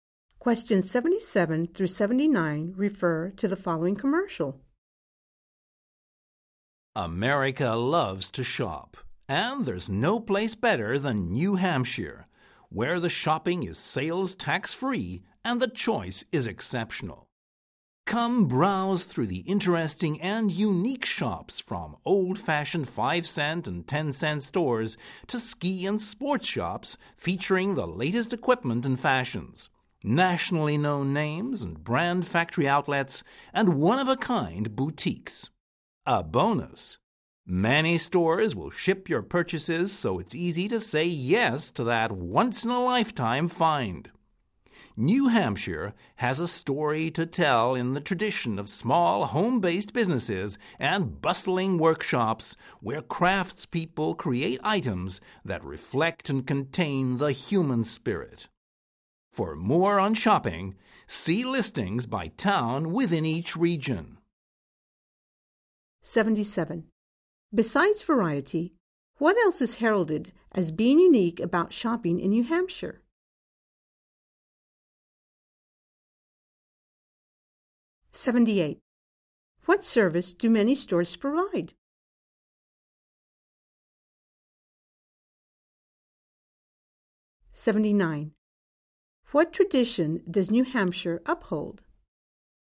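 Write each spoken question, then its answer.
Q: Besides variety, what else is heralded as being unique about shopping in New Hampshire?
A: It is sales tax-free

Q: What service do many stores provide?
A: They ship your purchases

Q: What tradition does New Hampshire uphold?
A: Small home-based businesses and workshops of craftspeople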